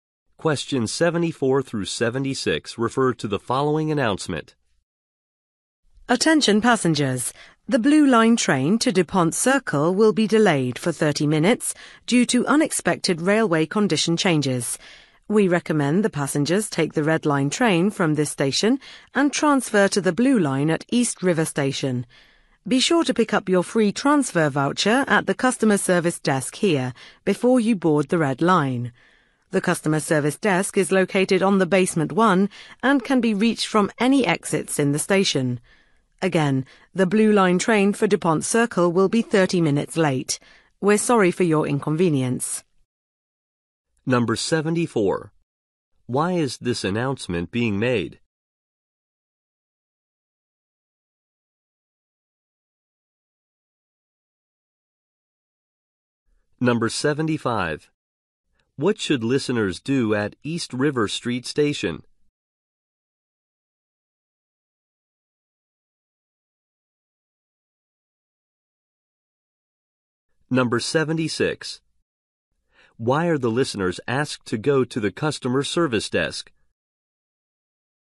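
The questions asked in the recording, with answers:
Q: Why is this announcement being made?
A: The Blue Line train is delayed 30 minutes

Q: What should listeners do at East River Street Station?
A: Transfer to the Blue Line

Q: Why are the listeners asked to go to the customer service desk?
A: To pick up a free transfer voucher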